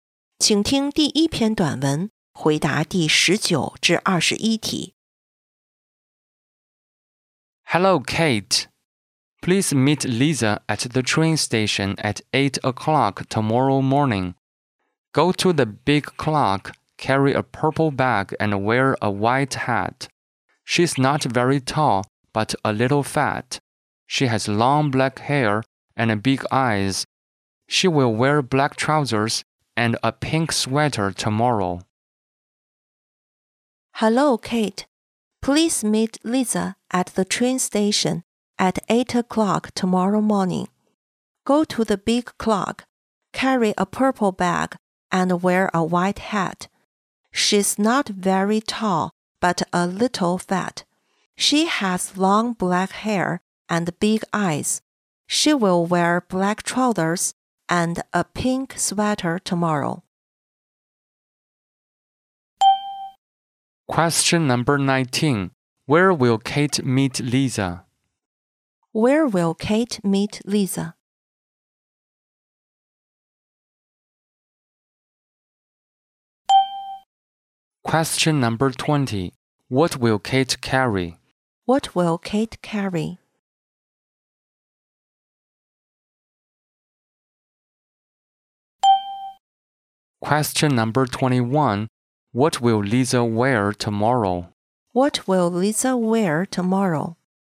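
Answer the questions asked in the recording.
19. At the train station (by the big clock).
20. A purple bag.
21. Black trousers and a pink sweater.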